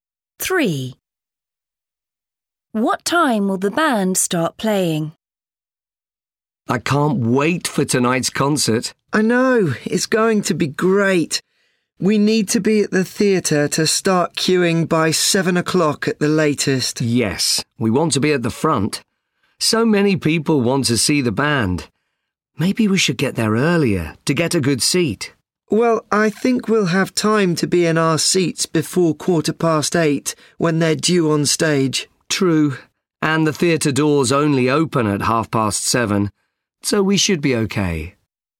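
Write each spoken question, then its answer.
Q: What time will the band start playing?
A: 8:15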